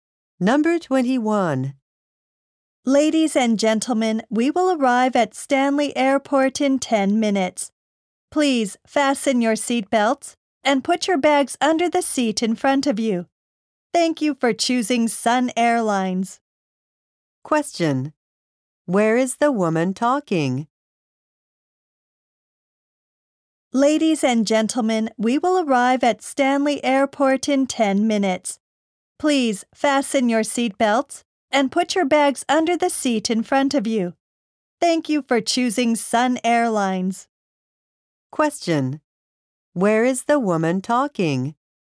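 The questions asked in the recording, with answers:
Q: Where is the woman talking?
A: On an airplane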